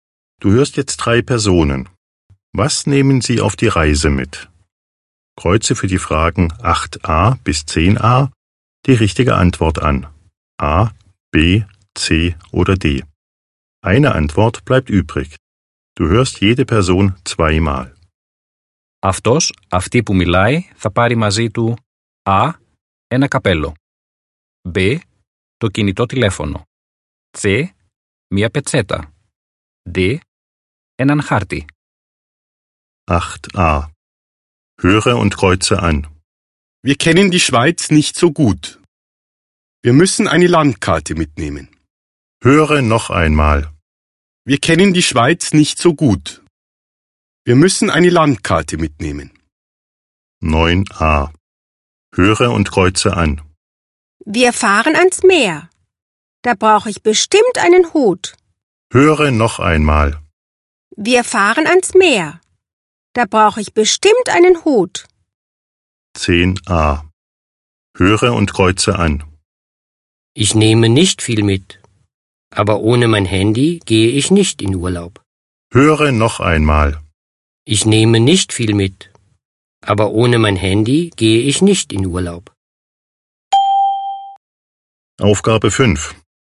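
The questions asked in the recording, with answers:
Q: Was nehmen sie auf die Reise mit?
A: D: έναν χάρτη

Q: Was nehmen sie auf die Reise mit?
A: A: ένα καπέλο

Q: Was nehmen sie auf die Reise mit?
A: B: το κινητό τηλέφωνο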